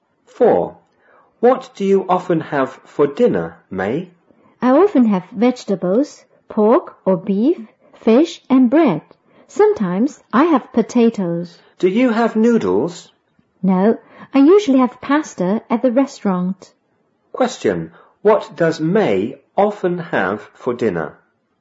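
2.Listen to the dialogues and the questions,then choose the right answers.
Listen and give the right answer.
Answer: Vegetables, pork or beef, fish and bread

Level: 五年级下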